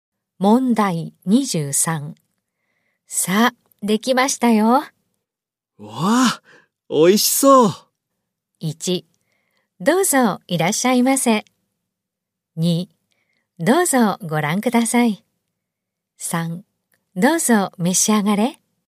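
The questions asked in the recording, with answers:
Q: さあ、できましたよ。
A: 3: どうぞ召し上がれ。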